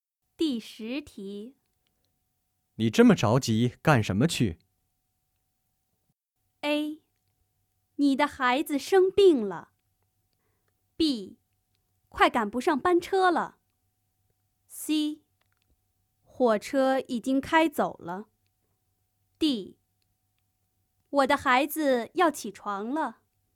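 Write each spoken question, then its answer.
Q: 你这么着急干什么去?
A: B: 快赶不上班车了。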